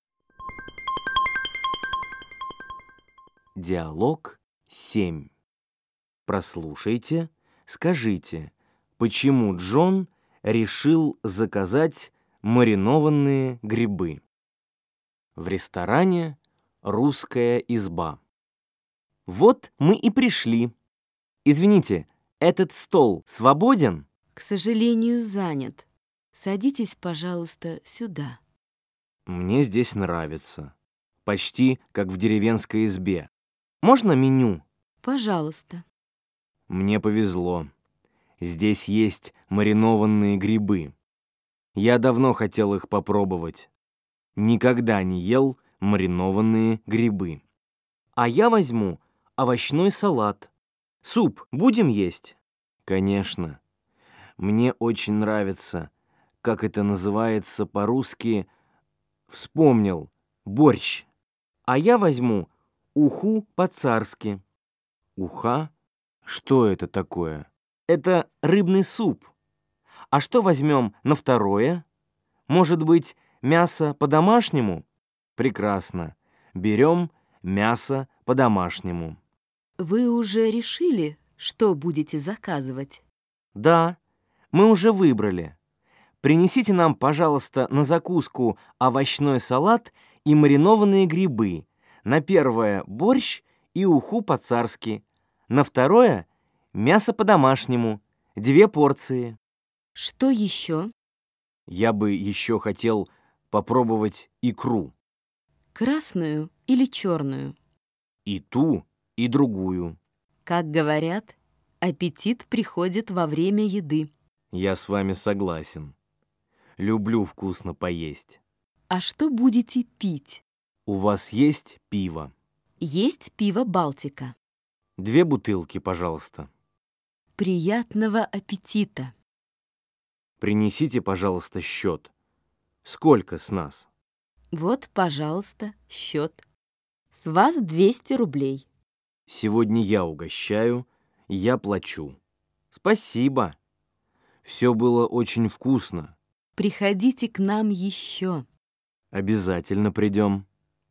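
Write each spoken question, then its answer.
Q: почему Джон решил заказать маринованные грибы?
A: Он давно хотел их попробовать, никогда не ел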